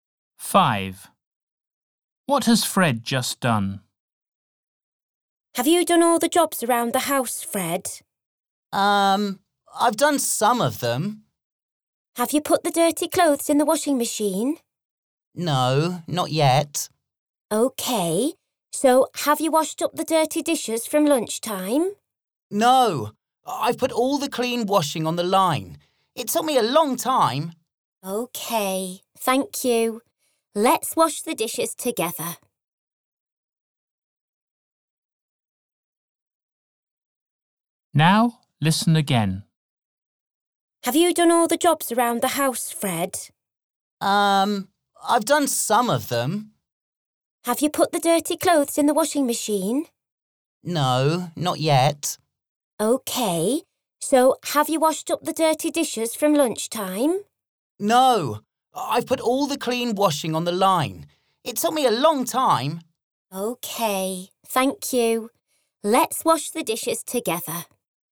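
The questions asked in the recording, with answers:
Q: What has Fred just done?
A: put the clean washing on the line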